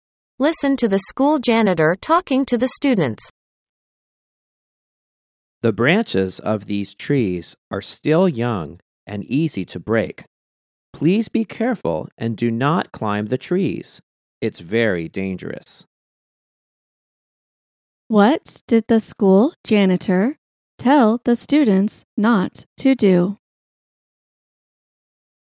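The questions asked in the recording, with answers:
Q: What did the school janitor tell the students not to do?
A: Climb the trees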